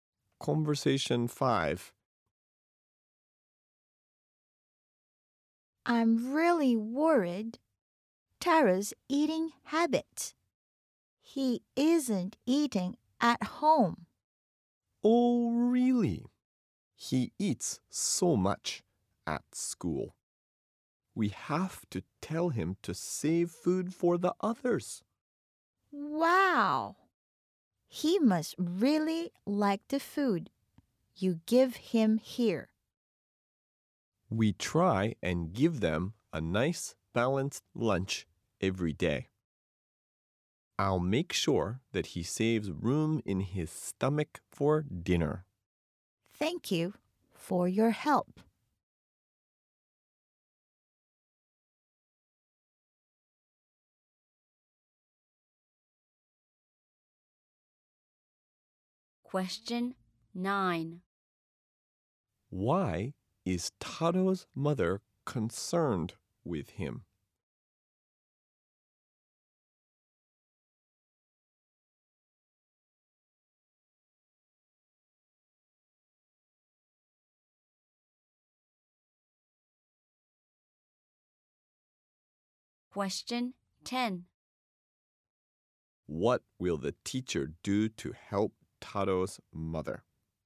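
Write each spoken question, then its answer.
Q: Why is Tato's mother concerned with him?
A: He isn't eating at home.

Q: What will the teacher do to help Tato's mother?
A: Make sure he doesn't eat too much at school so he saves room for dinner.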